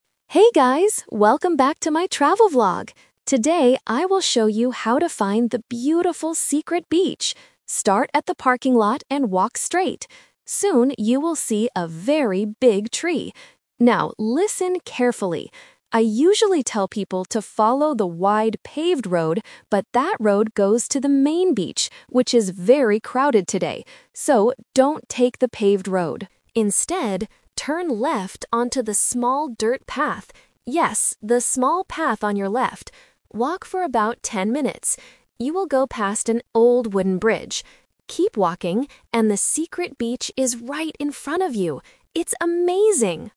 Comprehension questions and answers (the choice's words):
Listen to a travel vlogger giving directions in a video. Choose the correct answer (A, B, or C) for each question.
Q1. What should the viewers do when they see the big tree?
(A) Follow the wide paved road.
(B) Turn right into the forest.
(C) Turn left onto the small dirt path.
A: Turn left onto the small dirt path.

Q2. Why does the vlogger tell viewers NOT to take the paved road?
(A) Because it is closed for repairs.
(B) Because it goes to the crowded main beach.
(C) Because it is a very long walk.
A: Because it goes to the crowded main beach.

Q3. What landmark will viewers walk past on the dirt path?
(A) An old wooden bridge.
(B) A large parking lot.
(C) Another big tree.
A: An old wooden bridge.

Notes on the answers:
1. The Key: The vlogger gives the explicit instruction: "Instead, turn left onto the small dirt path." The Trap: Option (A) is the classic "Twist" trap. The vlogger mentions the paved road but warns listeners: "So, don't take the paved road." Option (B) is a random, incorrect direction.
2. The Key: The vlogger explains the reason for the twist: "...but that road goes to the main beach, which is very crowded today." The Trap: Option (A) is a common reason used in previous listening exercises (repairs), but it is not mentioned here. Option (C) is a plausible guess but incorrect according to the audio.
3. The Key: The vlogger says, "You will go past an old wooden bridge." The Trap: Option (B) is the starting point of the journey, not a landmark on the dirt path. Option (C) is the landmark they already passed before turning left.

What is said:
Vlogger: Hey guys, welcome back to my travel vlog! Today, I will show you how to find the beautiful secret beach. Start at the parking lot and walk straight. Soon, you will see a very big tree. Now, listen carefully. I usually tell people to follow the wide paved road, but that road goes to the main beach, which is very crowded today. So, don't take the paved road. Instead, turn left onto the small dirt path. Yes, the small path on your left. Walk for about ten minutes. You will go past an old wooden bridge. Keep walking, and the secret beach is right in front of you. It's amazing!